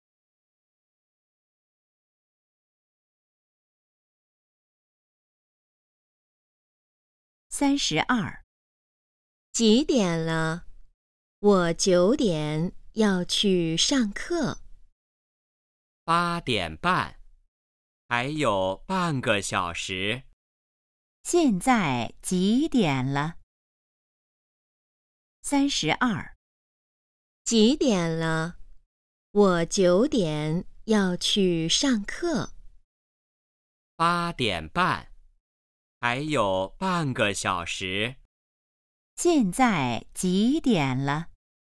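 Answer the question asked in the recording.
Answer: 八点半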